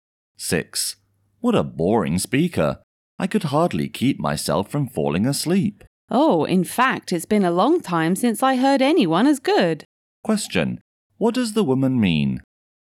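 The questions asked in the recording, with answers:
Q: What does the woman mean?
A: She thought the speaker was very good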